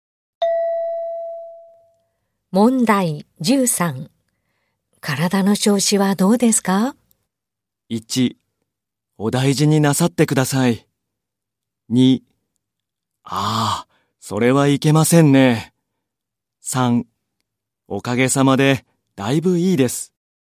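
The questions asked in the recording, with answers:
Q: 体の調子はどうですか?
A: 3: おかげさまで、だいぶいいです。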